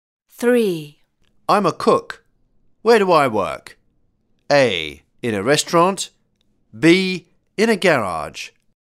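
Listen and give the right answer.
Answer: A: In a restaurant.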